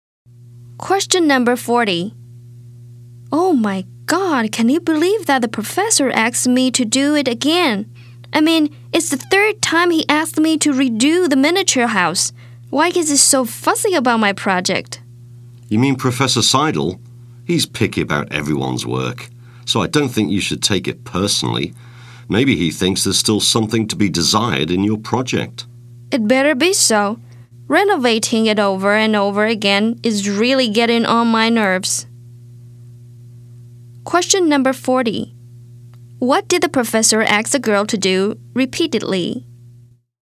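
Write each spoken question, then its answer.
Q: What did the professor ask the girl to do repeatedly?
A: Redo her miniature house project.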